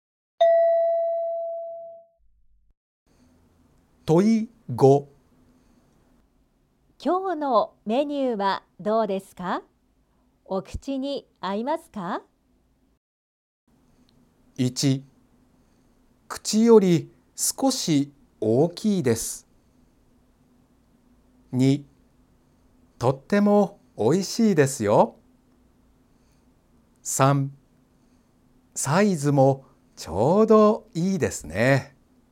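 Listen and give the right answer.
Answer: 2: とってもおいしいですよ。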